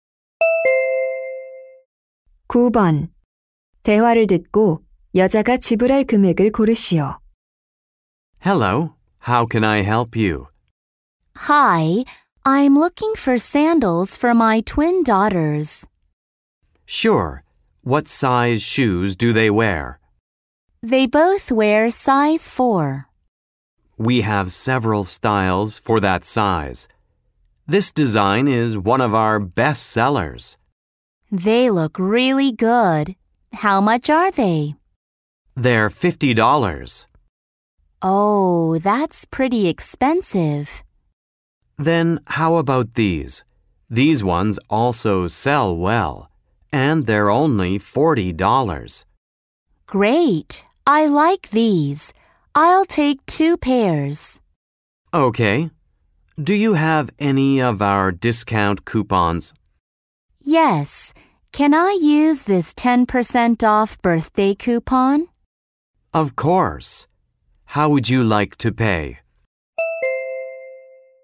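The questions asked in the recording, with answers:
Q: 대화를 듣고 여자가 지불할 금액을 고르시오.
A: $72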